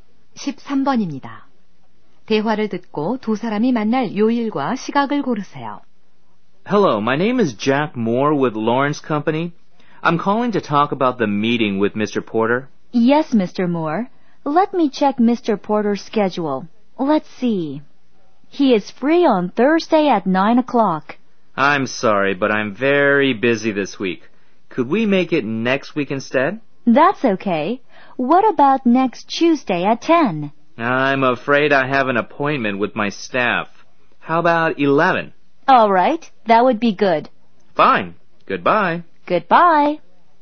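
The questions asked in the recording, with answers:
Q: 대화를 듣고 두 사람이 만날 요일과 시각을 고르세요.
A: 다음 주 화요일 11시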